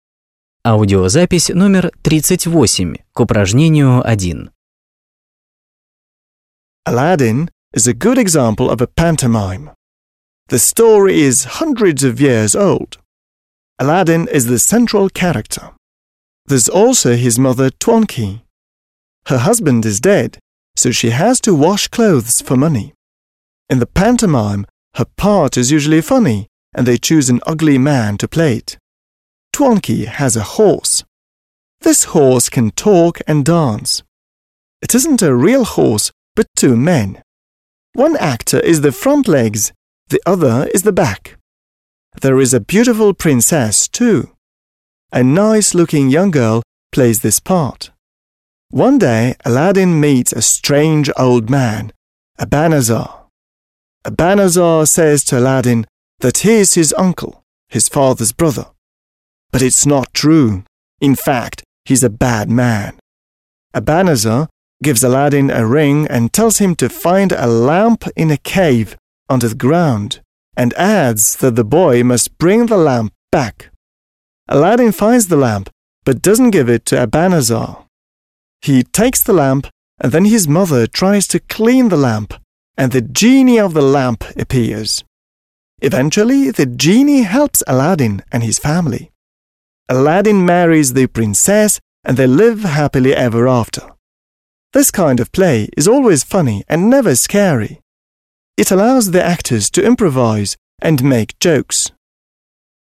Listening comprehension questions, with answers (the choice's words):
1. Listen, (38), and choose the right items to complete the sentences.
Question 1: The text is about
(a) pantomimes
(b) fairy stories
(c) comedies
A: pantomimes

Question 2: The part of Aladdin's mother is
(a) serious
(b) not serious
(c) tragic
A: not serious

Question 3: Aladdin does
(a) all that Abanazar tells him to do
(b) nothing of what Abanazar tells him to do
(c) something of what Abanazar tells him to do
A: something of what Abanazar tells him to do

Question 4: The text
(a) tells us how the Genie helps Aladdin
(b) doesn't tell us how the Genie helps Aladdin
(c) tells us something of how the Genie helps Aladdin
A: doesn't tell us how the Genie helps Aladdin

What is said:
Aladdin is a good example of a pantomime. The story is hundreds of years old. Aladdin is the central character. There's also his mother Twankey. Her husband is dead, so she has to wash clothes for money. In the pantomime her part is usually funny, and they choose an ugly man to play it. Twankey has a horse. This horse can talk and dance. It isn't a real horse, but two men. One actor is the front legs, the other is the back. There is a beautiful Princess too, a nice looking young girl plays this part. One day Aladdin meets a strange old man, Abanazar. Abanazar says to Aladdin that he is his uncle, his father's brother. But it's not true. In fact, he is a bad man. Abanazar gives Aladdin a ring and tells him to find a lamp in a cave under the ground and adds that the boy must bring the lamp back. Aladdin finds the lamp but doesn't give it to Abanazar. He takes the lamp and then his mother tries to clean the lamp, and the Genie of the lamp appears. Eventually Genie helps Alladin and his family. Alladin marries the Princess and they live happily ever after. This kind of play is always funny and never scary. It allows the actors to improvise and make jokes.

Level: 8 класс